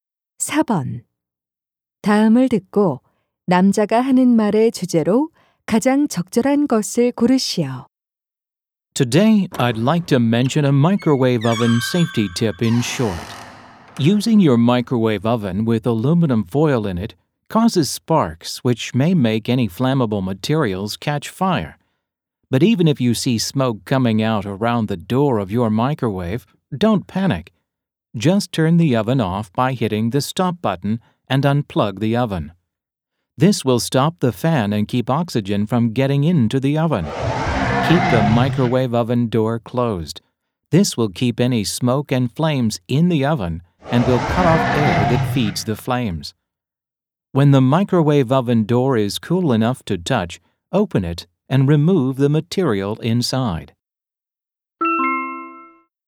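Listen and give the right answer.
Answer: 전자레인지 화재 시 대처 요령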